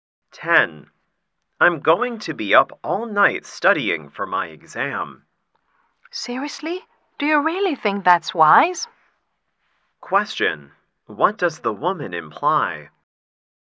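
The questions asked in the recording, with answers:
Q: What does the woman imply?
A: Staying up all night to study is not wise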